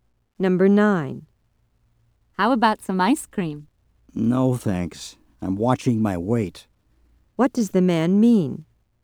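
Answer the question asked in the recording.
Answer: He doesn't want ice cream because he's trying not to gain weight.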